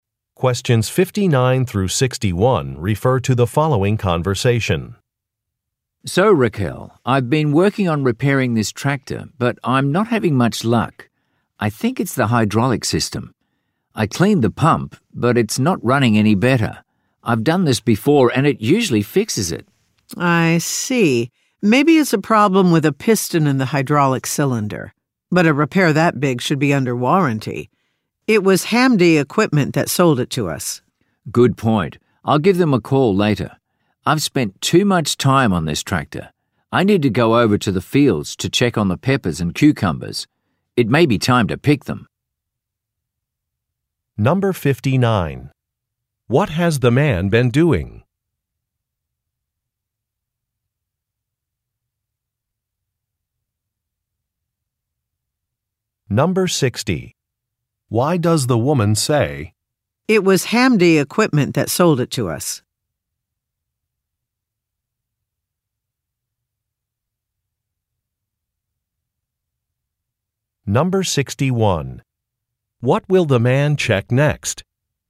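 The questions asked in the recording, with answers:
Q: What has the man been doing?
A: Repairing a tractor

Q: Why does the woman say, "It was Hamdi Equipment that sold it to us"?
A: To suggest the repair should be covered by the seller's warranty

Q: What will the man check next?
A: The crops (peppers and cucumbers) in the fields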